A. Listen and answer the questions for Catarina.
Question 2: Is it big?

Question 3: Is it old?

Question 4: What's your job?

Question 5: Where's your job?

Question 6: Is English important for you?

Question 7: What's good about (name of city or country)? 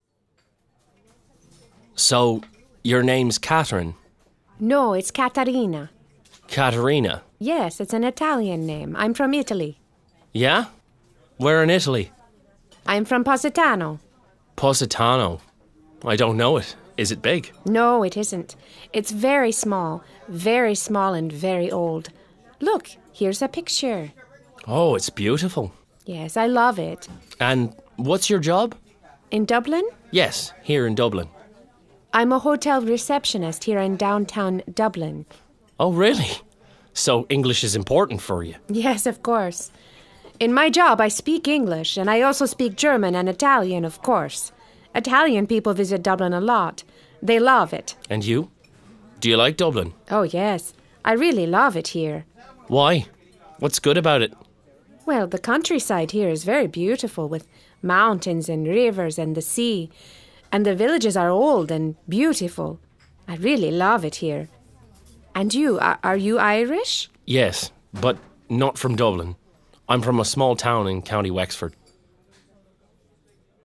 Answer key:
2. no
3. yes
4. hotel receptionist
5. downtown Dublin
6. yes
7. the countryside is beautiful, the villages are old and beautiful